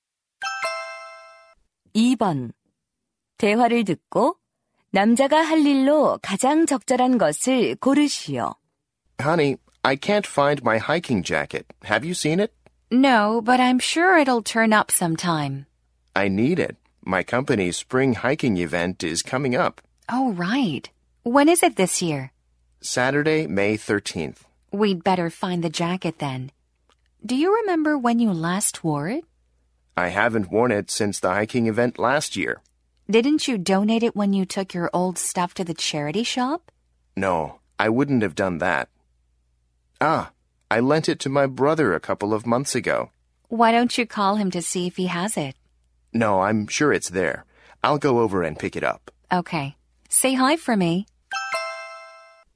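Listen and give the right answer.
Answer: 형(남동생) 집에 가서 등산 재킷 가져오기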